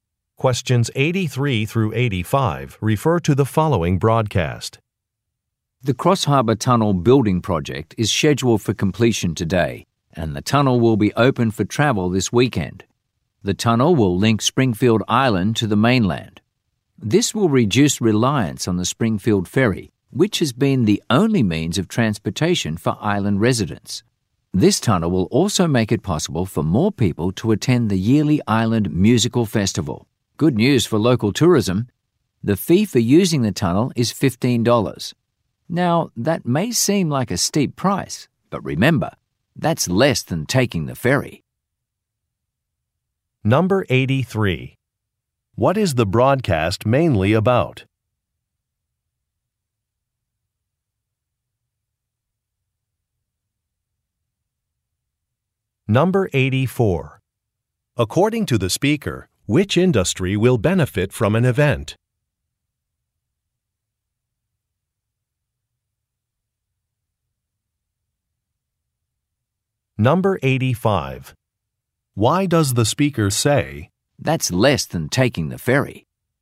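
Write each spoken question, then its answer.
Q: What is the broadcast mainly about?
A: The opening of a new tunnel (the Cross Harbour Tunnel)

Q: According to the speaker, which industry will benefit from an event?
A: Tourism

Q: Why does the speaker say,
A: To suggest the $15 tunnel fee is reasonable because it costs less than the ferry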